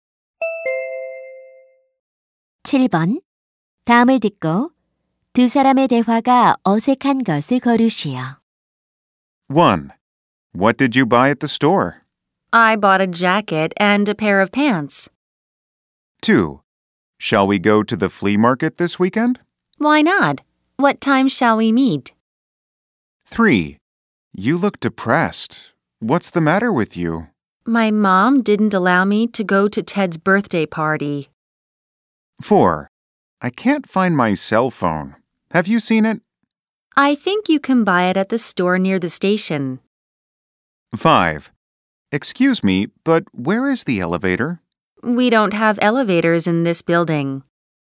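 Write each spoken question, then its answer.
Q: 다음을 듣고 두 사람의 대화가 어색한 것을 거르시오.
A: 4: I can't find my cell phone. Have you seen it? / I think you can buy it at the store near the station.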